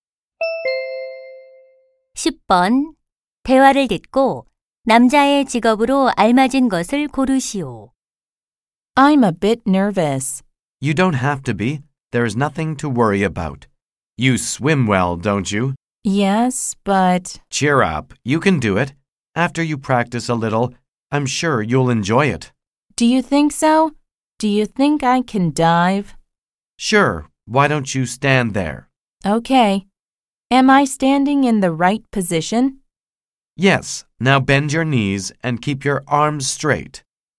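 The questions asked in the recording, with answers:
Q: 대화를 듣고 남자의 직업으로 알맞은 것을 고르시오.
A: 다이빙(수영) 강사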